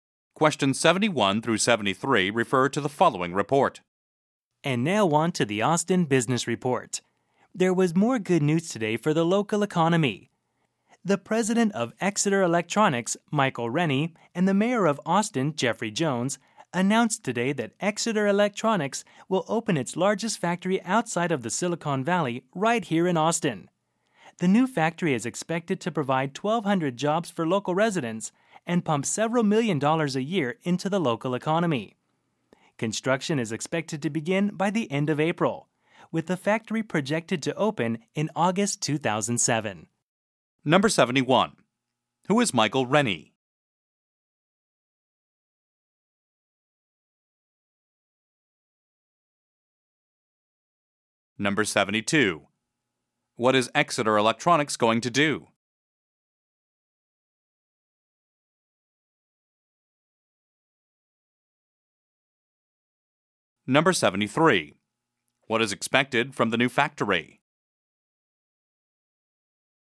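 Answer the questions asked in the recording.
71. The president of Exeter Electronics
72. Open a large factory in Austin
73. 1,200 jobs and millions of dollars for the local economy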